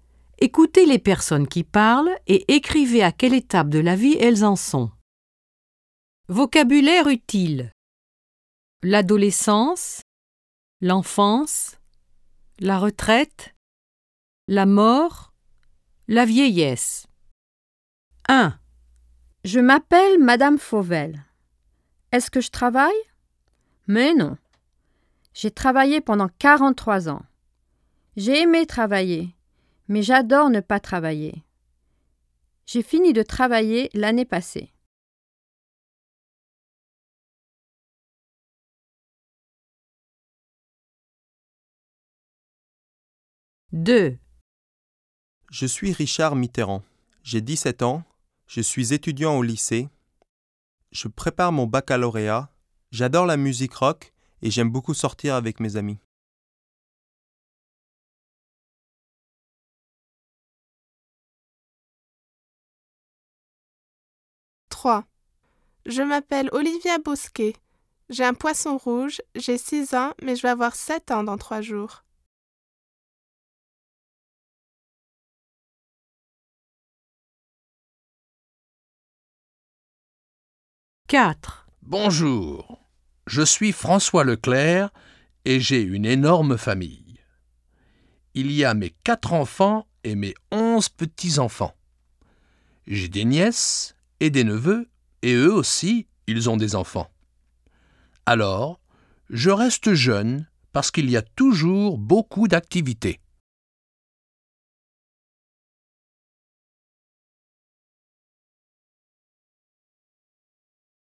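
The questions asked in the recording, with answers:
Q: Écoutez les personnes qui parlent et écrivez à quelle étape de la vie elles en sont.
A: la retraite

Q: Écoutez les personnes qui parlent et écrivez à quelle étape de la vie elles en sont.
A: l'adolescence

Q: Écoutez les personnes qui parlent et écrivez à quelle étape de la vie elles en sont.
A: l'enfance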